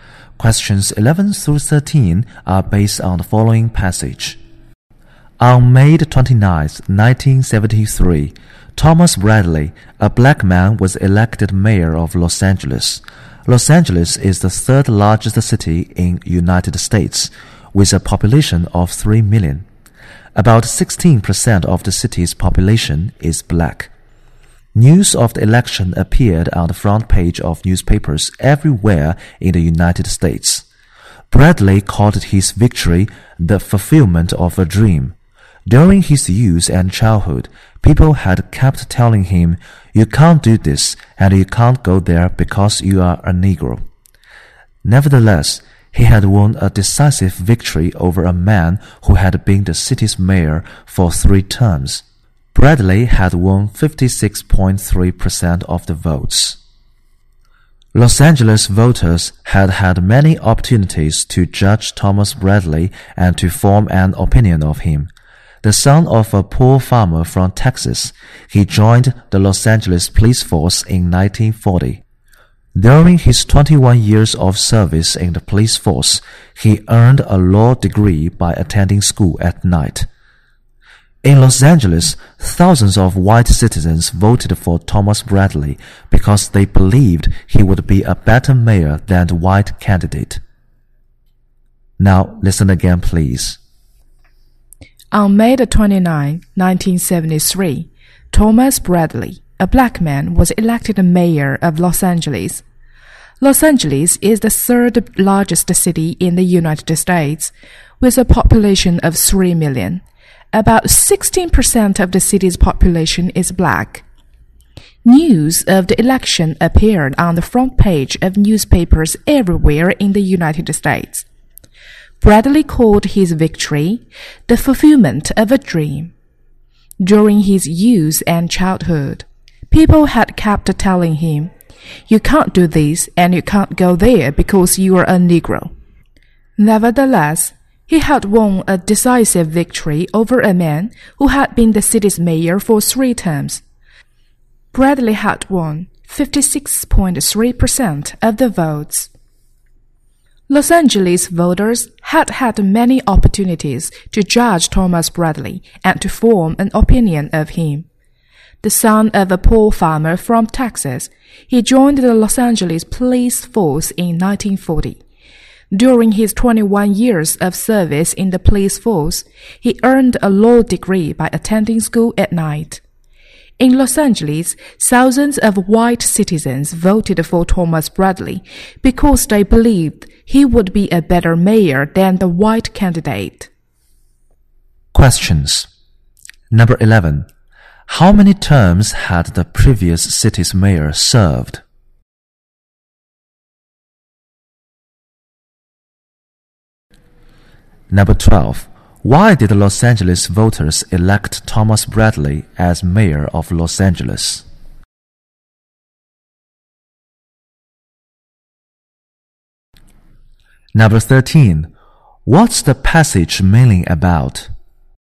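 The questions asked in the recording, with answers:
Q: How many terms had the previous city's mayor served?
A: Three

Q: Why did the Los Angeles voters elect Thomas Bradley as mayor of Los Angeles?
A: They believed he would be a better mayor than the white candidate

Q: What's the passage mainly about?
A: The election of a black man, Thomas Bradley, as mayor of Los Angeles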